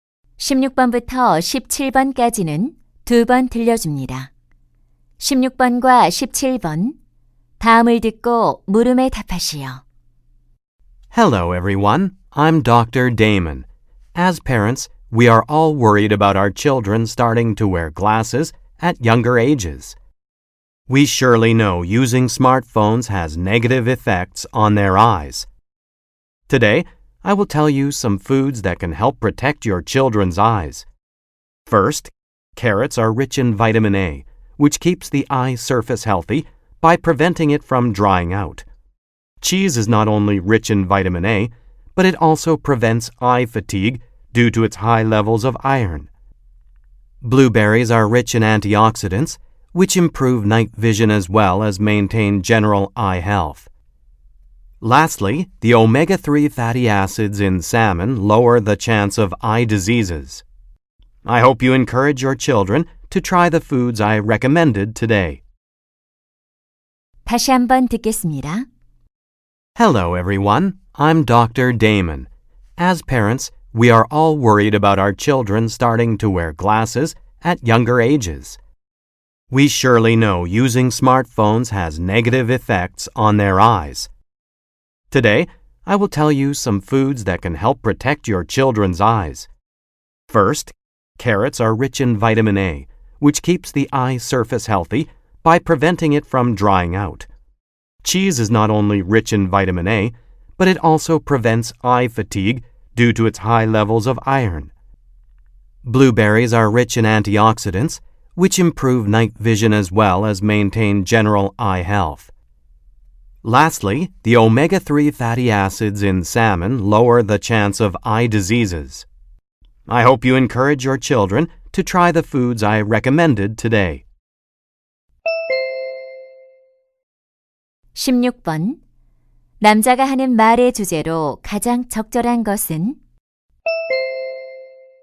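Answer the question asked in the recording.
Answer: 아이들의 눈 건강에 도움이 되는 음식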